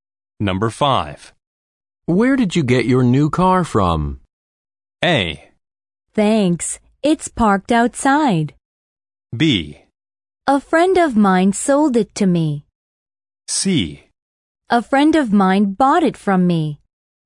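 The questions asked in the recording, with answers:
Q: Where did you get your new car from?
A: B: A friend of mine sold it to me.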